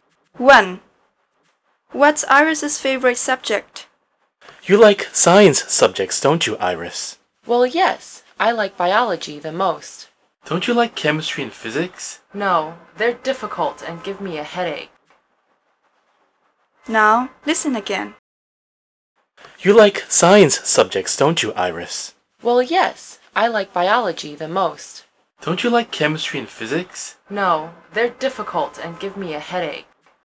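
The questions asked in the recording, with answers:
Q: What's Iris's favorite subject?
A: Biology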